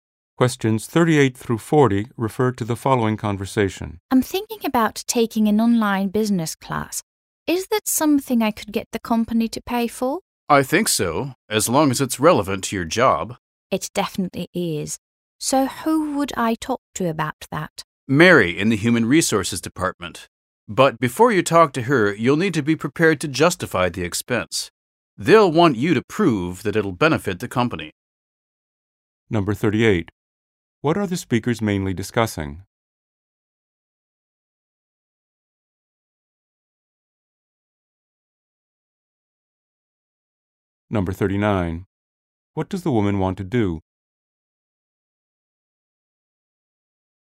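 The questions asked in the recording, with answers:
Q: What are the speakers mainly discussing?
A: Getting the company to pay for an online business class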